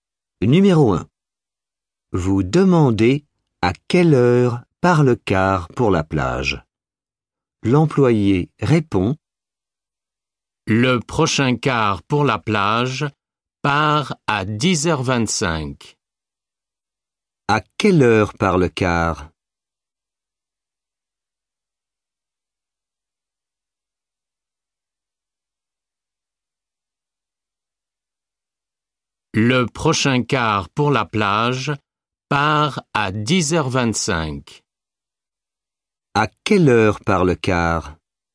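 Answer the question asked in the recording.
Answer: À 10h25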